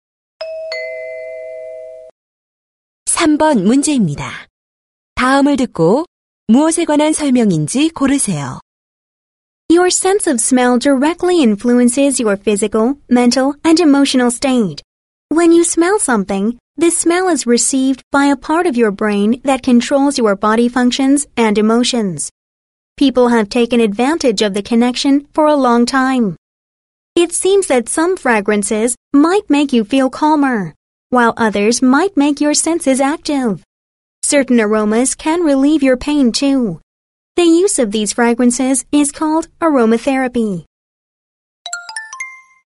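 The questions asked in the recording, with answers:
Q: 다음을 듣고 무엇에 관한 설명인지 고르세요.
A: 아로마테라피(향기 요법)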